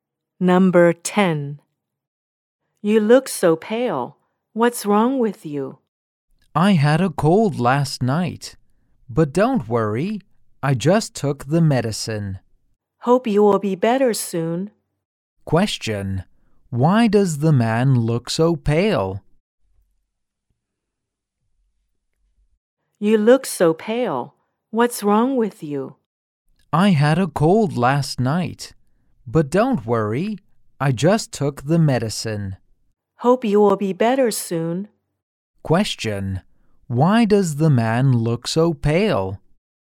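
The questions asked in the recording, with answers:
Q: Why does the man look so pale?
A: He had a cold last night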